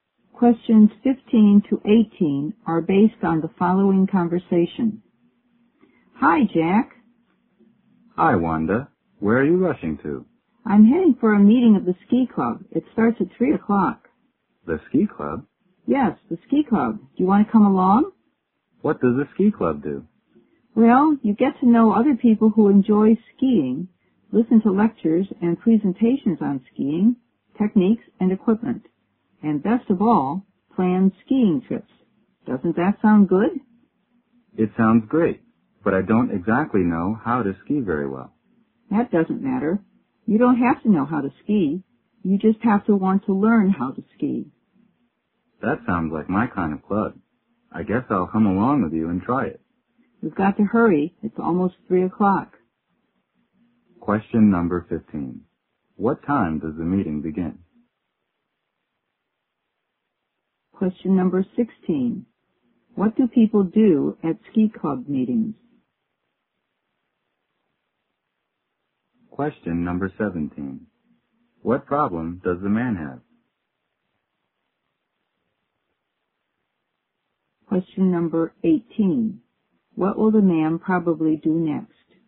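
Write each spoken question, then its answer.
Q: What time does the meeting begin?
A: At 3 o'clock

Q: What do people do at ski club meetings?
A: Meet other skiers, listen to talks on skiing, and plan ski trips

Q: What problem does the man have?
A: He doesn't know how to ski very well

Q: What will the man probably do next?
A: Go to the ski club meeting with Wanda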